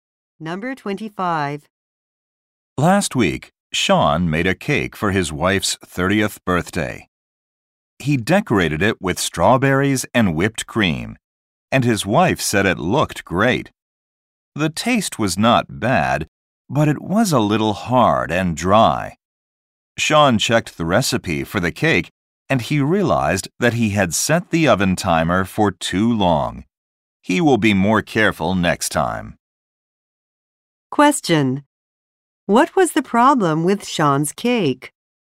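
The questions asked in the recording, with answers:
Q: What was the problem with Sean's cake?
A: It was hard and dry because he baked it too long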